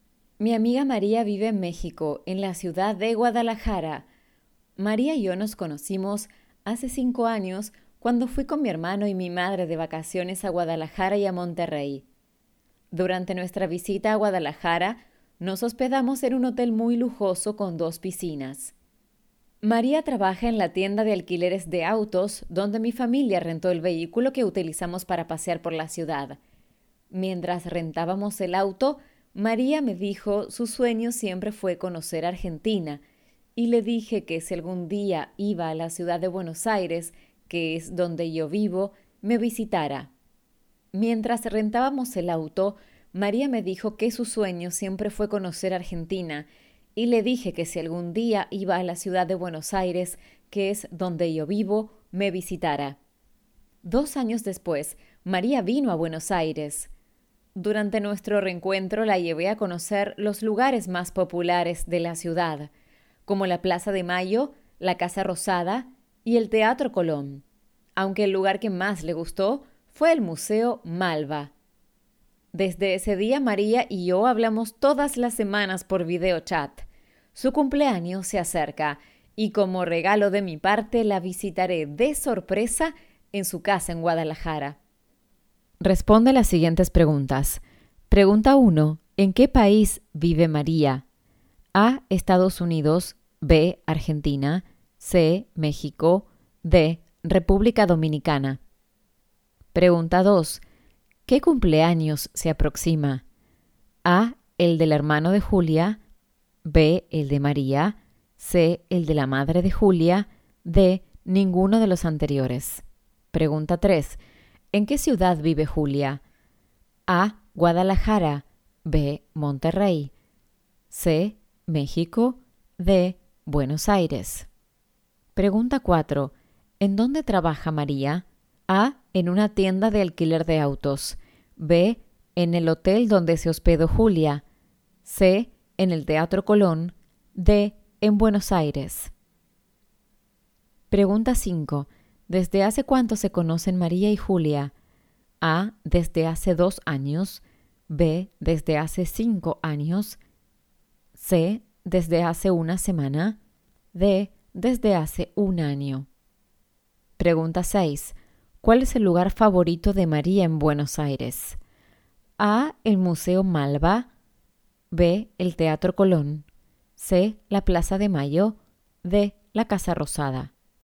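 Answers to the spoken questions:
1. C: México
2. B: El de María
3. D: Buenos Aires
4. A: En una tienda de alquiler de autos
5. B: Desde hace 5 años
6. A: El Museo Malba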